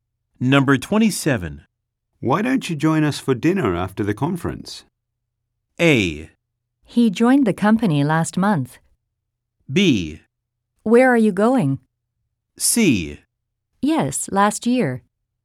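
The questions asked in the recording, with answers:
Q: Why don't you join us for dinner after the conference?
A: B: Where are you going?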